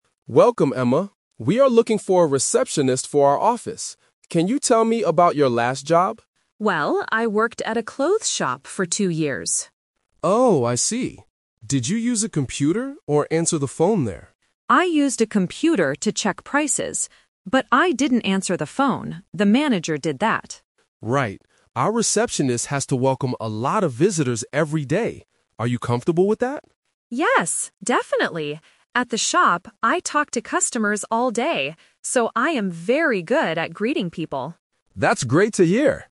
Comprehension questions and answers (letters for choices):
Listen to the job interview. Circle the correct answer (A, B, or C).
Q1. What did Emma do at her last job?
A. She answered the phone.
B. She checked prices on a computer.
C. She cleaned the clothes shop.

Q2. Who answered the phone at the clothes shop?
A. The manager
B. Emma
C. The receptionist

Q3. Why does Emma think she will be a good receptionist?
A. Because she worked as a receptionist before.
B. Because she is good at making clothes.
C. Because she is used to talking to customers.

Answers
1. B
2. A
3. C

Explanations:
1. Emma says, "I used a computer to check prices." Option (A) is a trap because the interviewer asks about answering the phone, but she says she didn't do it. Option (C) is a plausible task for a shop worker, but it is not mentioned in the audio.
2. When asked about the phone, Emma clearly states: "The manager did that." Option (B) is the trap. Option (C) is also a trap because "receptionist" is the job she is applying for now, not the person who answered phones at her old job.
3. Emma says, "At the shop, I talked to customers all day, so I am very good at greeting people." Option (A) is a trap: she worked at a clothes shop, not as a receptionist. Option (B) is a trap using the word "clothes," but she didn't make them.

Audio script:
Davis: Welcome, Emma. We are looking for a receptionist for our office. Can you tell me about your last job?
Emma: Well, I worked at a clothes shop for two years.
Mr. Davis: Oh, I see. Did you use a computer or answer the phone there?
Emma: I used a computer to check prices. But I didn't answer the phone. The manager did that.
Davis: Right. Our receptionist has to welcome a lot of visitors every day. Are you comfortable with that?
Emma: Yes, definitely! At the shop, I talked to customers all day, so I am very good at greeting people.